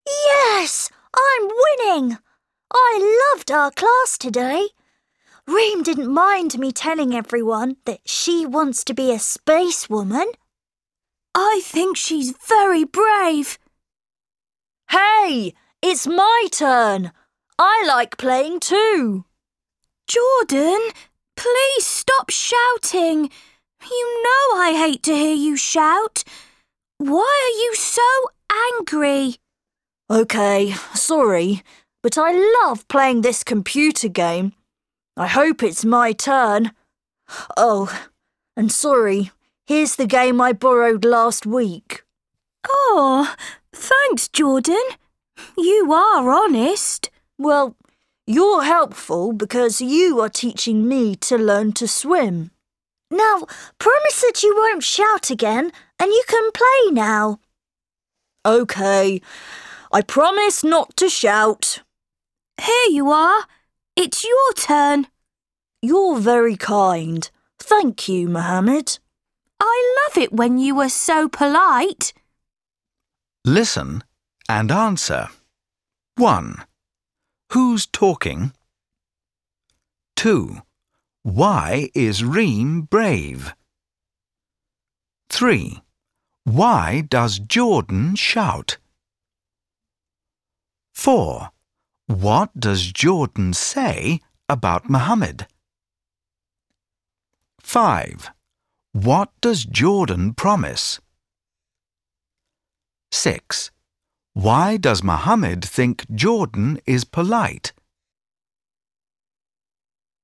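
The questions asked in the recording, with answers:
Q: Why is Reem brave?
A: She wants to be a spacewoman.

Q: Why does Jordan shout?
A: He wants his turn playing the computer game.

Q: What does Jordan say about Mohammed?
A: He is helpful because he is teaching Jordan to swim.

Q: What does Jordan promise?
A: Not to shout.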